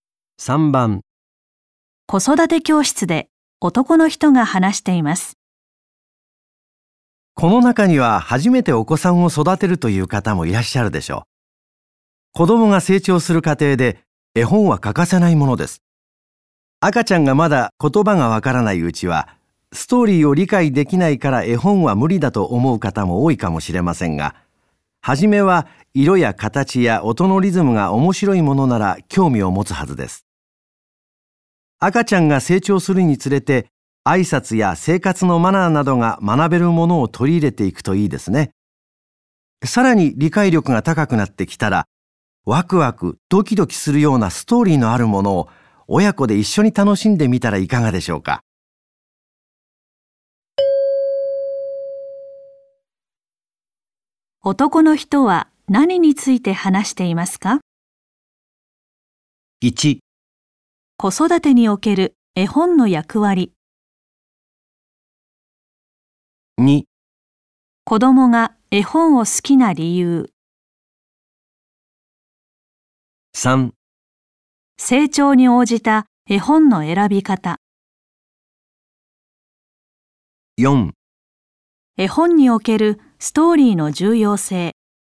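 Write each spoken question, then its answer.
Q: 男の人は何について話していますか?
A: 3: 成長に応じた絵本の選び方。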